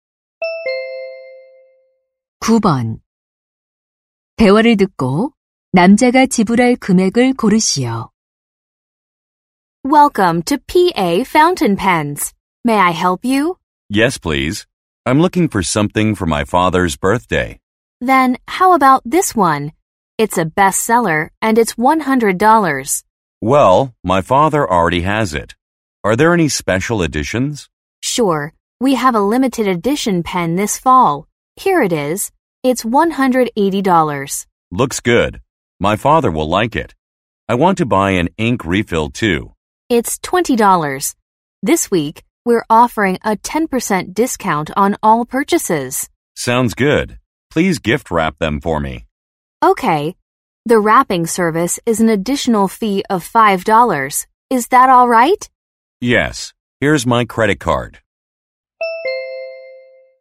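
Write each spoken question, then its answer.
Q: 대화를 듣고 남자가 지불할 금액을 고르시오.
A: 185달러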